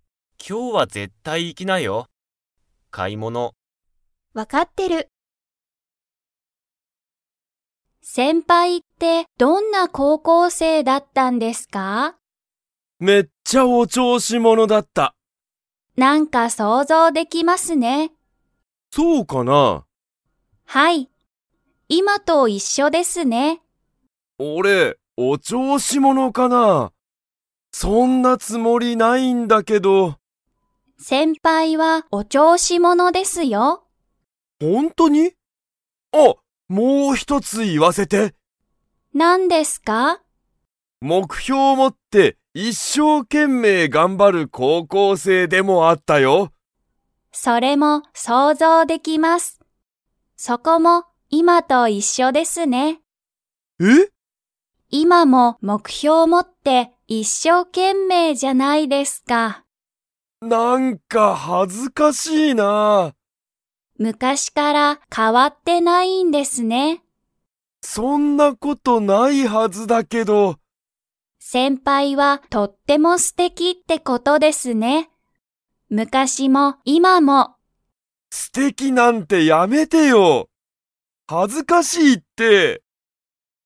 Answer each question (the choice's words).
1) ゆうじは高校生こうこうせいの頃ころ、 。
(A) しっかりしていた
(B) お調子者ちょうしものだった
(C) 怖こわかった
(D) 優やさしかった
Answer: お調子者ちょうしものだった

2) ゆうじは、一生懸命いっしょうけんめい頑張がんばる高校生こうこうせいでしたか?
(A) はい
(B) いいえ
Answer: はい

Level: Level 4